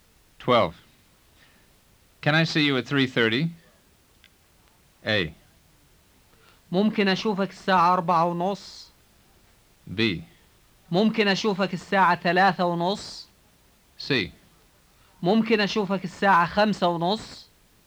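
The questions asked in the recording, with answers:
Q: Can I see you at 3:30?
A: B: ممكن أشوفك الساعة 3:30.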